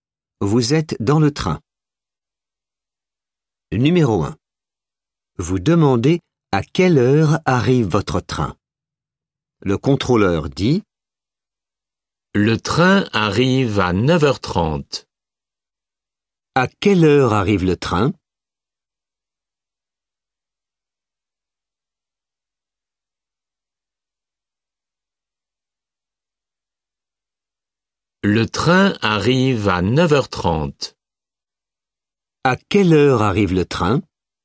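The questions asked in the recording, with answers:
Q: À quelle heure arrive le train ?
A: À 9h30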